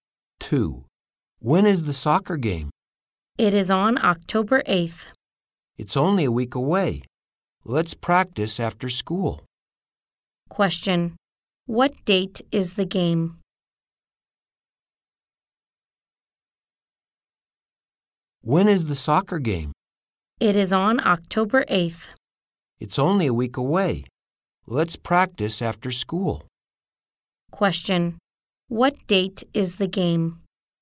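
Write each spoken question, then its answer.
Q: what date is the game?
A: October 8th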